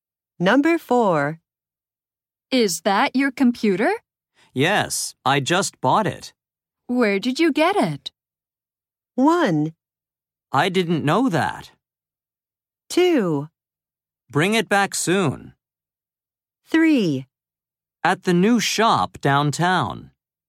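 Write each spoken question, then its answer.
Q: Where did you get it?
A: 3: At the new shop downtown.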